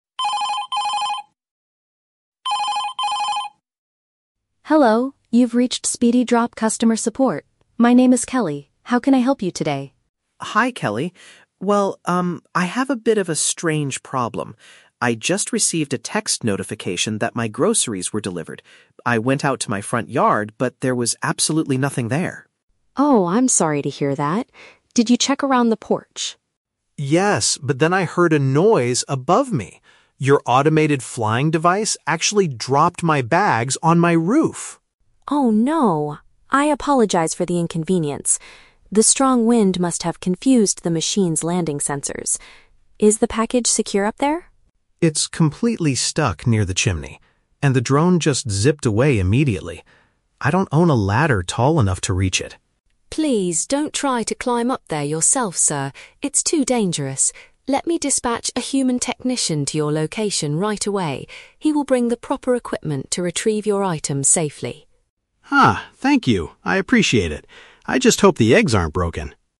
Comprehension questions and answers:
Listen to a phone conversation between a customer and a support agent, then choose the correct answer (A, B, or C) for each question.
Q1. Where did the machine leave the man's groceries?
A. In the grass area in front of his house.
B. On top of his house next to the chimney.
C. On the wooden porch near the front door.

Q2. According to the agent, why did the delivery error likely occur?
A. The weather conditions interfered with the equipment.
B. The flying vehicle was broken by the strong wind.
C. The customer provided the wrong delivery instructions.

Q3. What does the agent instruct the caller to do next?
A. Use a tall ladder to get the package down.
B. Check the grocery bags for any broken items.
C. Wait safely for a company worker to arrive.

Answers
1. B
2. A
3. C

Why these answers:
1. The customer says the device dropped the bags on his "roof" and they are stuck near the "chimney." "On top of his house" is a paraphrase for the roof. Why the trap is wrong: Option (A) is a trap. The man mentions he went out to his "front yard," but says there was "nothing there." Option (C) is also a trap. The agent asks if he checked the "porch," but the food was not there.
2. The agent explains that the "strong wind must have confused the machine's landing sensors." Wind is a weather condition, and confusing the sensors means it interfered with the equipment. Why the trap is wrong: Option (B) is a trap. The wind confused the sensors, but the agent never says the vehicle was "broken" by it (in fact, it flew away). Option (C) is a plausible reason for a lost package, but it is not mentioned in the audio.
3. The agent tells him she will "dispatch a human technician to your location right away." This means he just needs to wait for the worker to arrive. Why the trap is wrong: Option (A) is a trap. The customer mentions a ladder, but the agent strictly tells him, "Please don't try to climb up there yourself... It's too dangerous." Option (B) is a trap because the customer mentions hoping his eggs aren't broken, but he cannot check them because they are on the roof.

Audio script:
My name is Kelly. How can I help you today?
Customer: Hi, Kelly. Well, um, I have a bit of a strange problem. I just received a text notification that my groceries were delivered. I went out to my front yard, but there was absolutely nothing there.
Agent: Oh, I'm sorry to hear that. Did you check around the porch?
Customer: Yes, but then I heard a noise above me. Your automated flying device actually dropped my bags on my roof!
Agent: Oh no! I apologize for the inconvenience. The strong wind must have confused the machine's landing sensors. Is the package secure up there?
Customer: It's completely stuck near the chimney. And the drone just zipped away immediately. I don't own a ladder tall enough to reach it.
Agent: Please don't try to climb up there yourself, sir. It's too dangerous. Let me dispatch a human technician to your location right away. He will bring the proper equipment to retrieve your items safely.

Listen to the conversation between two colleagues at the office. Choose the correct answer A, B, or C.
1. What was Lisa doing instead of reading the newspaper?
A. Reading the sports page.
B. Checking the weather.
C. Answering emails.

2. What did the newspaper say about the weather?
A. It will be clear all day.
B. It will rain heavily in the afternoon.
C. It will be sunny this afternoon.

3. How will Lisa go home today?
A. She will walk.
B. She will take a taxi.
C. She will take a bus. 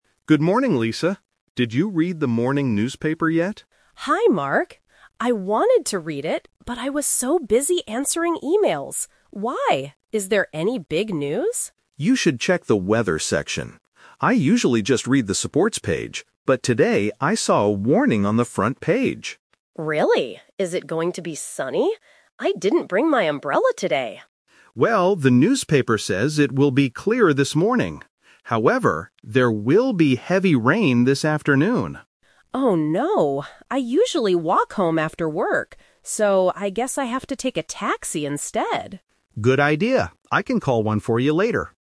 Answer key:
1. C
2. B
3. B

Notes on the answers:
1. Lisa says, "I wanted to read it, but I was so busy answering emails." Trap: Option A is a trap because reading the "sports page" is what Mark usually does. Option B is what Mark tells Lisa to do, not what she was doing.
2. Mark says, "However, there will be heavy rain this afternoon." Trap: Option A is a trap. The newspaper says it will be clear, but only this morning, not all day. Option C is a trap because Lisa asks if it will be sunny, but that is not the actual news.
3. Lisa says, "I guess I have to take a taxi instead." Trap: Option A is a trap based on her habit ("I usually walk home"). She changes her plan because of the rain. Option C is not mentioned in the audio.

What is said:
Mark: Good morning, Lisa. Did you read the morning newspaper yet?
Lisa: Hi, Mark. I wanted to read it, but I was so busy answering emails. Why? Is there any big news?
Mark: You should check the weather section. I usually just read the sports page, but today I saw a warning on the front page.
Lisa: Really? Is it going to be sunny? I didn't bring my umbrella today.
Mark: Well, the newspaper says it will be clear this morning. However, there will be heavy rain this afternoon.
Lisa: Oh no! I usually walk home after work. So, I guess I have to take a taxi instead.

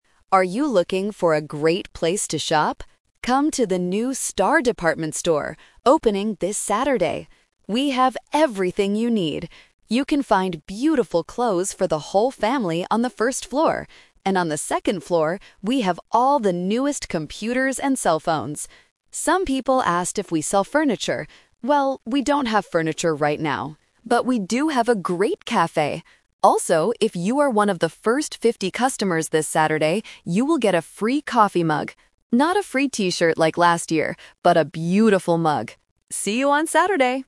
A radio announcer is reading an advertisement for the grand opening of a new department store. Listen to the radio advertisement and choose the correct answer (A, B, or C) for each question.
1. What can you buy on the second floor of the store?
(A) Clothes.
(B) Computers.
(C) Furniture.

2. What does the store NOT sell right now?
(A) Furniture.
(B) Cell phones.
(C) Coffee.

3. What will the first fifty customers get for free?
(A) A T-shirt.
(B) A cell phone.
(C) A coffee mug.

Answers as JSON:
{"1": "B", "2": "A", "3": "C"}

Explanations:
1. The announcer clearly states, "And on the second floor, we have all the newest computers and cell phones." Why the trap is wrong: Option (A) is the trap because clothes are on the first floor, not the second. Option (C) is a trap because the store doesn't sell furniture at all.
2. The announcer asks if they sell furniture, and then answers: "Well, we don't have furniture right now." Why the trap is wrong: Option (B) is sold on the second floor. Option (C) is available because the announcer says they "have a great café!"
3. This is "The Twist". The ad says, "you will get a free coffee mug. Not a free T-shirt like last year..." Why the trap is wrong: Option (A) is the trap. They gave away T-shirts last year, but not this time. Option (B) uses a word from the audio, but a free cell phone is too expensive and incorrect.

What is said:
Announcer: Are you looking for a great place to shop? Come to the new Star Department Store, opening this Saturday! We have everything you need. You can find beautiful clothes for the whole family on the first floor. And on the second floor, we have all the newest computers and cell phones. Some people asked if we sell furniture. Well, we don't have furniture right now. But we do have a great café! Also, if you are one of the first fifty customers this Saturday, you will get a free coffee mug.

